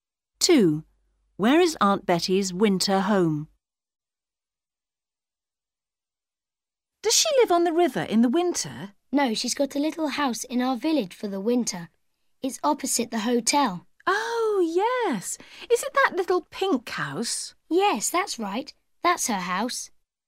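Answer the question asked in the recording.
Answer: A little pink house in the village, opposite the hotel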